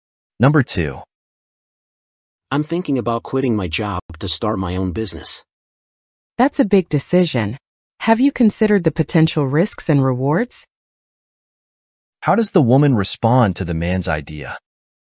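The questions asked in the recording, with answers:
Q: How does the woman respond to the man's idea?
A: She asks if he has considered the risks and rewards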